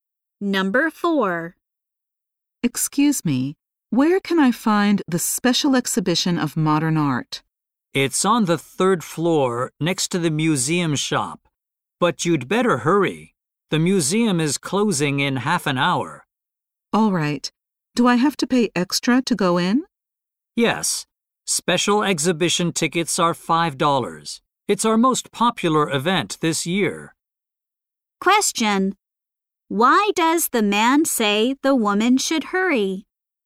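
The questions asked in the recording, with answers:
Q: Why does the man say the woman should hurry?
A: The museum closes in half an hour.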